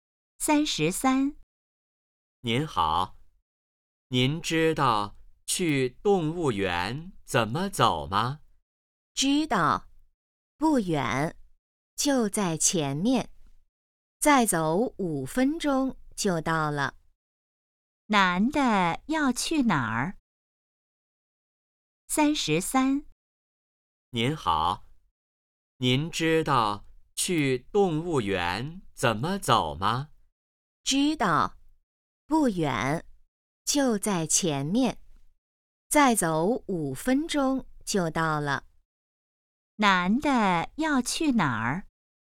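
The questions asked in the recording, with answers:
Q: 男的要去哪儿?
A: 动物园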